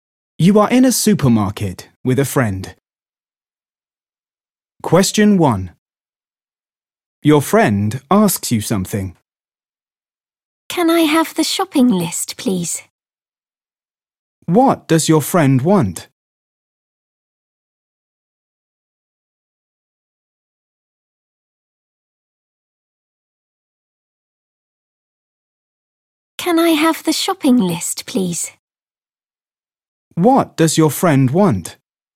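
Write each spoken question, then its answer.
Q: What does your friend want?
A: the shopping list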